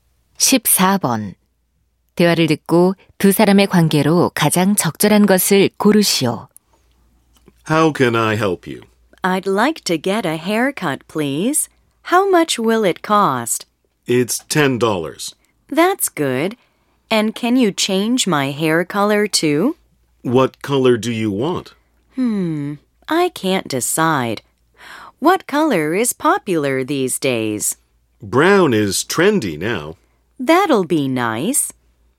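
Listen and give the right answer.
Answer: 미용사와 손님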